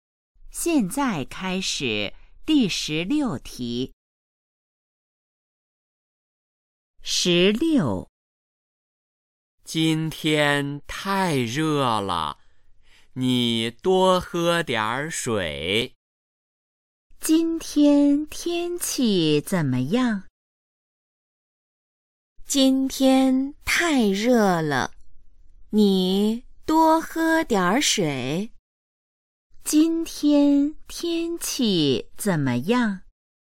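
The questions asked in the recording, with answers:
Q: 今天天气怎么样?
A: 太热了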